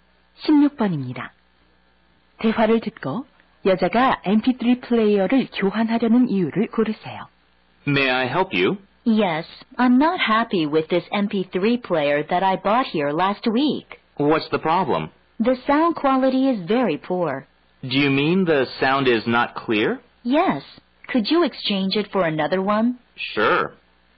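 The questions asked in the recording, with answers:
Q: 대화를 듣고 여자가 MP3 플레이어를 교환하려는 이유를 고르세요.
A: 음질이 나빠서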